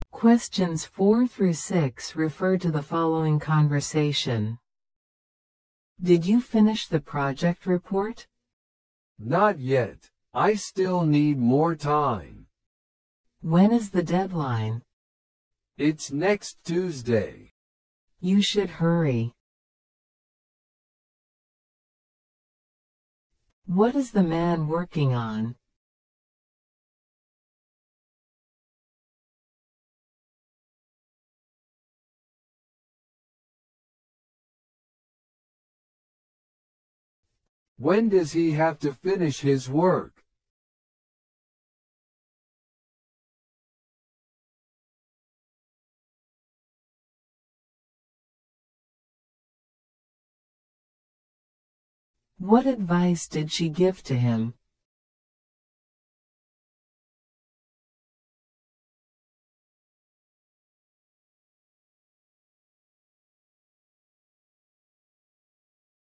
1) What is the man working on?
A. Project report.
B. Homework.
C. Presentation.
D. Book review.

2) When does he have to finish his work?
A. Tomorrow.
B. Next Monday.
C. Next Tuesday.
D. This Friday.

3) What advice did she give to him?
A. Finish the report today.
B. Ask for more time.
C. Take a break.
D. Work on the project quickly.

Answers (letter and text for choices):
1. A. Project report.
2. C. Next Tuesday.
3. D. Work on the project quickly.

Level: 初級者用